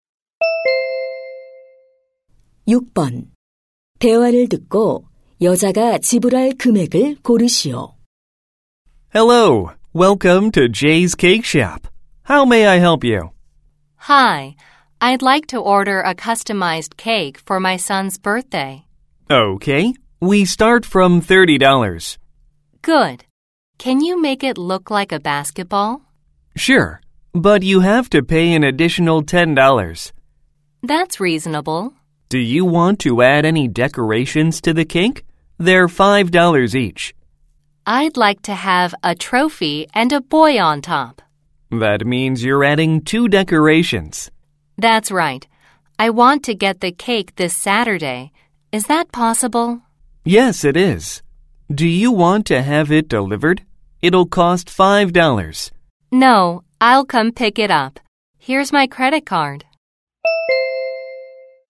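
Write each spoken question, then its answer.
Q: 대화를 듣고 여자가 지불할 금액을 고르시오.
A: 50달러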